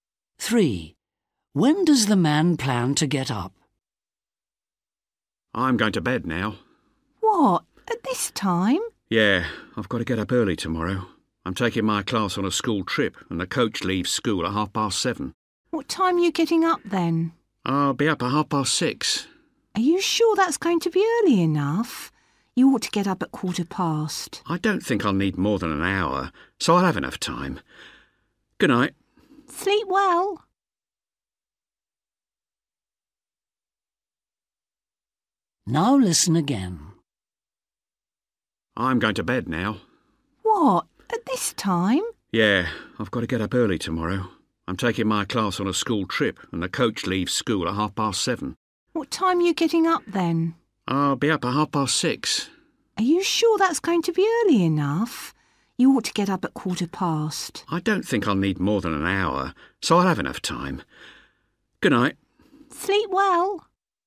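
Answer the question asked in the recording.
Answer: 6:30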